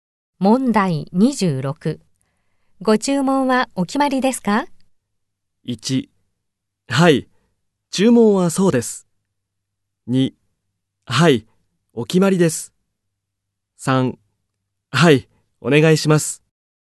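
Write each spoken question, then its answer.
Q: ご注文はお決まりですか?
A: 3: はい、お願いします。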